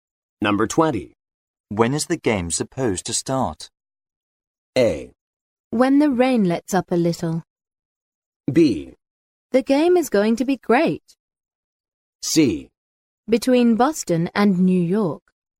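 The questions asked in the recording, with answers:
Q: When is the game supposed to start?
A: A: When the rain lets up a little.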